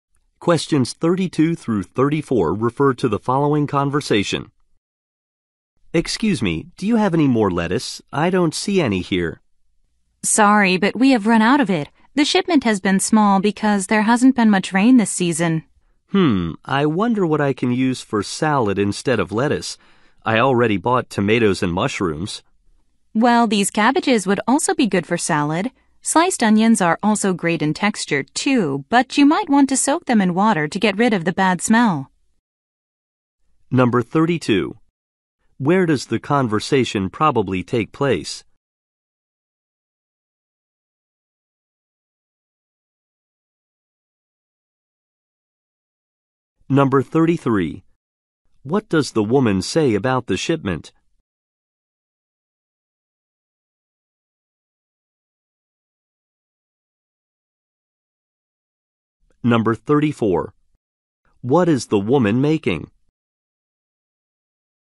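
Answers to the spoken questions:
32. At a grocery store
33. It has been small because there hasn't been much rain
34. A salad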